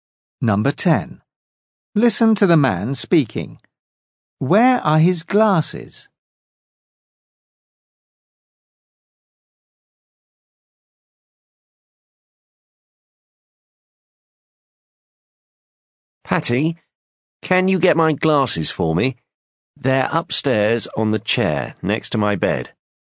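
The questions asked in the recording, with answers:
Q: Where are his glasses?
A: upstairs on the chair next to his bed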